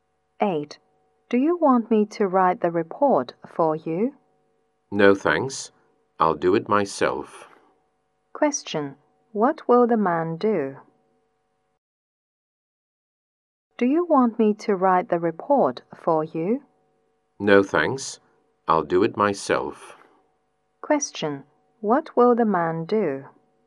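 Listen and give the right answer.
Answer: Write the report himself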